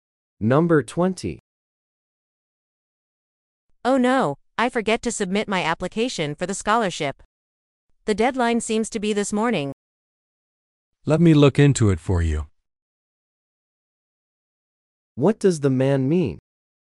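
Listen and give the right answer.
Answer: He will check the deadline for her.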